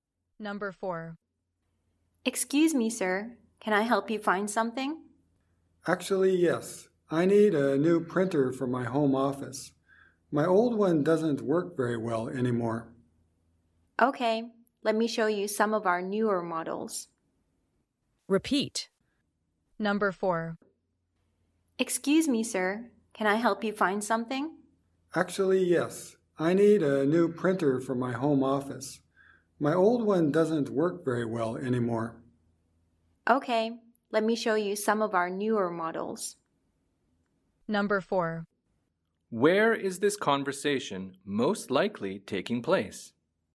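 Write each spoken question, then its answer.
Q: Where is this conversation most likely taking place?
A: In a store that sells printers (an electronics store)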